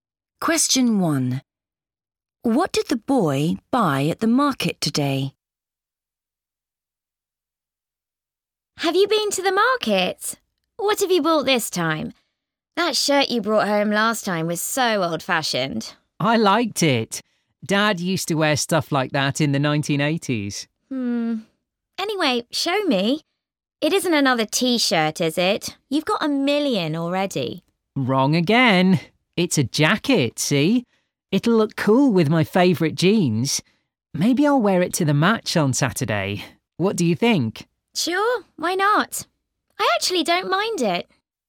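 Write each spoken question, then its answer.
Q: What did the boy buy at the market today?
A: A jacket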